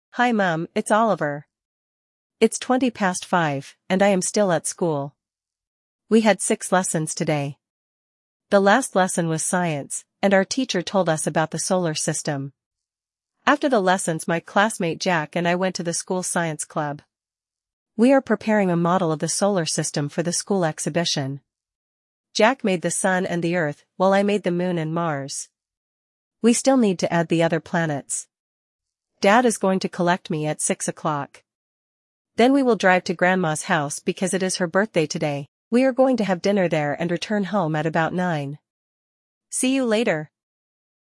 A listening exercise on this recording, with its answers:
Прослушайте текст и определите, какие из приведённых утверждений A–E соответствуют содержанию текста (1 — Right), а какие не соответствуют (2 — False). Вы услышите текст дважды.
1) Oliver is speaking to his mother.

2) Oliver had seven lessons at school today.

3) Oliver went to the science club with his classmate.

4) Oliver and Jack made a model of the Moon.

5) Oliver is going to have dinner at home.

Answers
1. Right
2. False
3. Right
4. Right
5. False

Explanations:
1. Оливер обращается к маме: Hi Mum, it's Oliver.
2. У Оливера было шесть уроков, а не семь.
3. После уроков Оливер и его одноклассник Джек отправились в школьный научный кружок.
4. Оливер сделал Луну и Марс, поэтому утверждение о том, что друзья сделали модель Луны, соответствует тексту.
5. Оливер будет ужинать в доме бабушки, а не у себя дома.

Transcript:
It's twenty past five, and I am still at school. We had six lessons today. The last lesson was Science, and our teacher told us about the Solar System.
After the lessons my classmate Jack and I went to the school science club. We are preparing a model of the Solar System for the school exhibition. Jack made the Sun and the Earth, while I made the Moon and Mars. We still need to add the other planets.
Dad is going to collect me at six o'clock. Then we will drive to Grandma's house because it is her birthday today. We are going to have dinner there and return home at about nine.
See you later!

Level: 6 класса